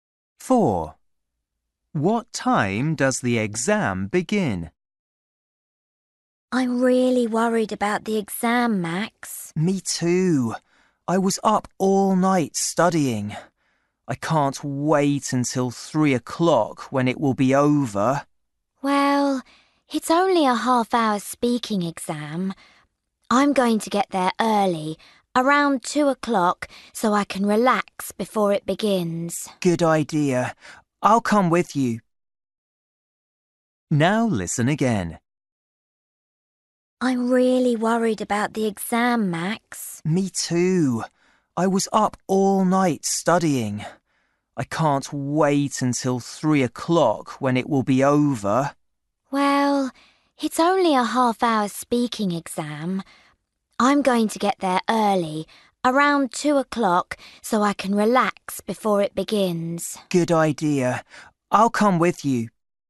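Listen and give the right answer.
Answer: 2:30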